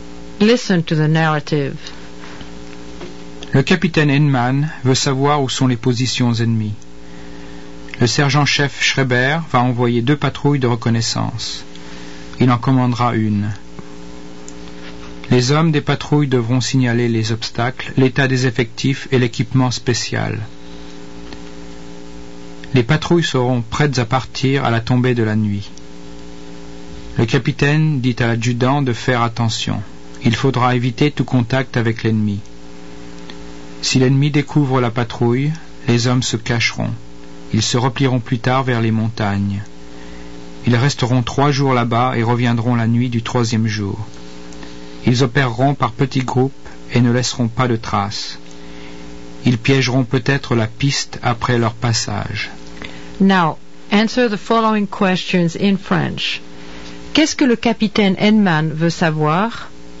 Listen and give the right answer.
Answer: Le capitaine veut savoir où sont les positions ennemies.